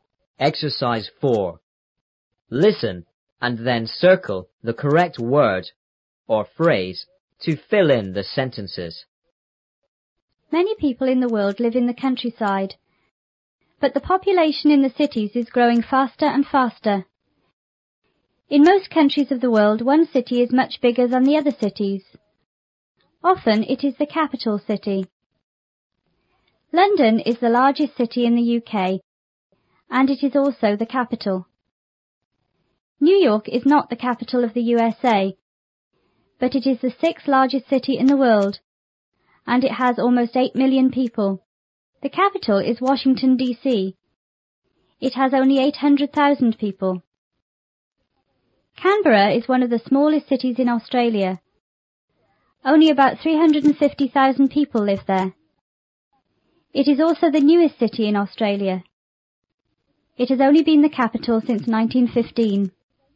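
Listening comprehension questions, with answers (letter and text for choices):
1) The population of the cities is growing___.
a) faster and faster.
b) slower and slower.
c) taller and taller.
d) shorter and shorter.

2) Often the___city is bigger than the other cities in the country.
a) new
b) most beautiful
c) capital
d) old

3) London is the___city in the UK.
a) smallest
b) coldest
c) largest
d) hottest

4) New York is the___city in the world.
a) third largest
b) smallest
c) largest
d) sixth largest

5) The capital of the USA is___.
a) London.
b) Washington DC.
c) New York.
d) Paris.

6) ___people live in the capital of the USA.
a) Eight million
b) Eight hundred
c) Eight thousand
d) Eight hundred thousand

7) The capital of Australia is___in the country.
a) the largest and newest city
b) the oldest and one of the largest cities.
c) the oldest and smallest city.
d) the newest and one of the smallest cities.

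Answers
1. a) faster and faster.
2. c) capital
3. c) largest
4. d) sixth largest
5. b) Washington DC.
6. d) Eight hundred thousand
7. d) the newest and one of the smallest cities.

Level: 初中英语广州版3B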